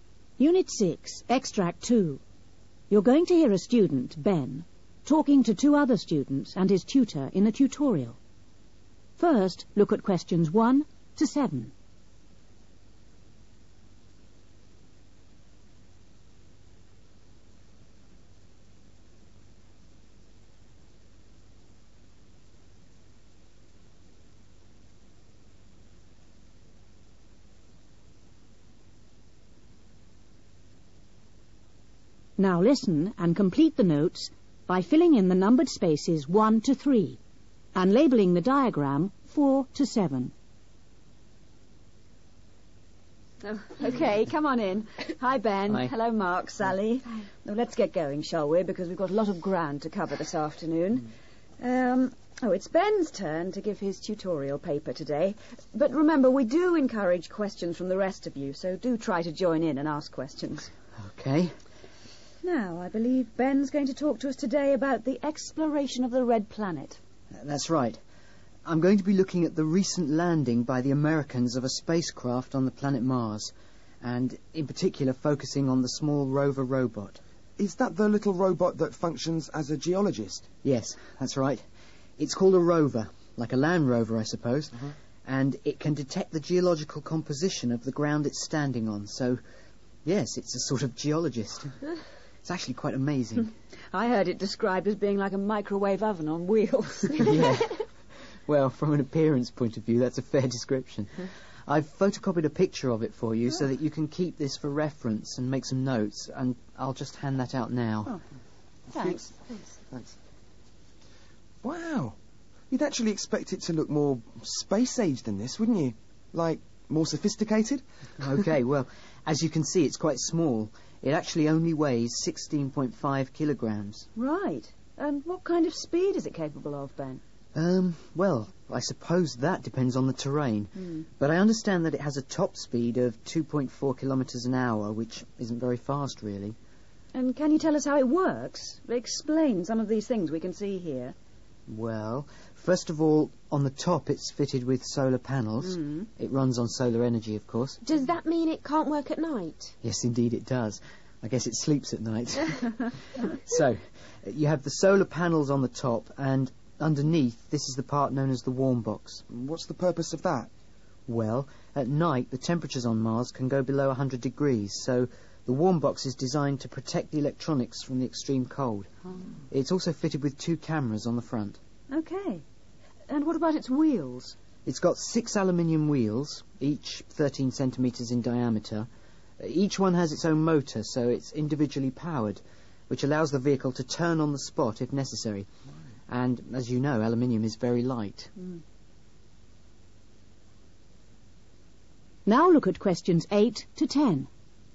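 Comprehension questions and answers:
Complete the notes. Use NO MORE THAN THREE WORDS for each answer.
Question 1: The robot does the work of a (1) ................................. .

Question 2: It looks like a (2) ............................ on wheels.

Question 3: It weighs 16.5kg and travels quite (3) ........................... .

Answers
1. geologist
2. microwave oven
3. slowly

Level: B1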